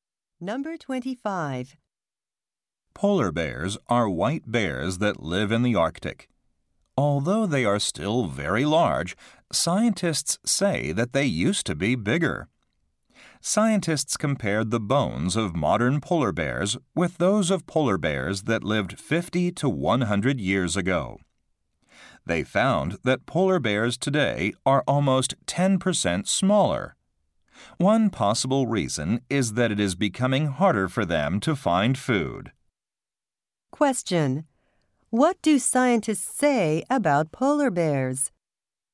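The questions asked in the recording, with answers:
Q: What do scientists say about polar bears?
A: They are smaller than they used to be.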